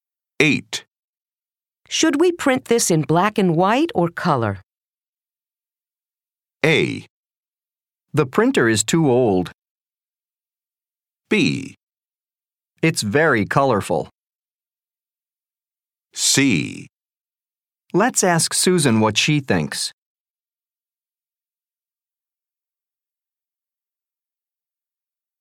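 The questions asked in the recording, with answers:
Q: Should we print this in black and white or color?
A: C: Let's ask Susan what she thinks.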